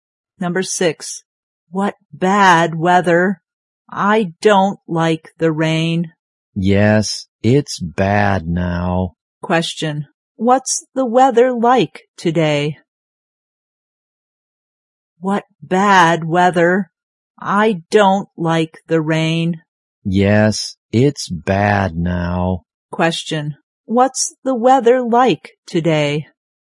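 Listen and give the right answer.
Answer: Rainy.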